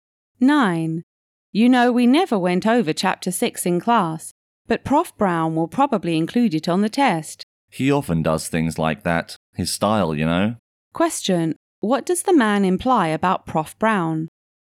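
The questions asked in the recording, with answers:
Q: What does the man imply about Prof. Brown?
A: He often tests material not covered in class, so Chapter 6 will probably be on the test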